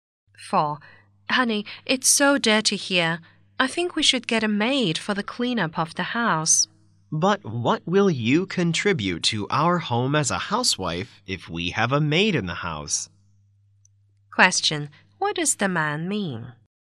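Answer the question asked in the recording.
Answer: His wife should do the housework instead of hiring a maid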